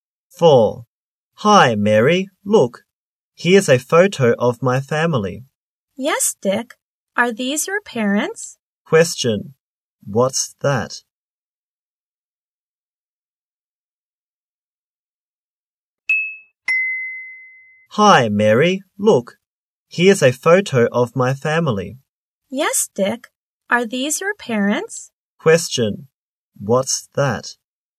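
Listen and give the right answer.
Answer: A photo of Dick's family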